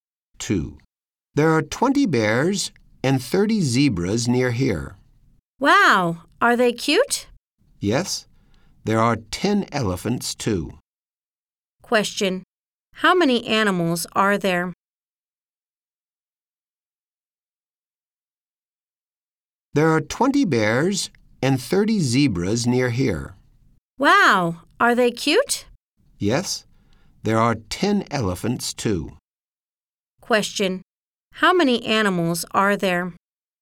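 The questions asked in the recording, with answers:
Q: Question. How many animals are there?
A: 60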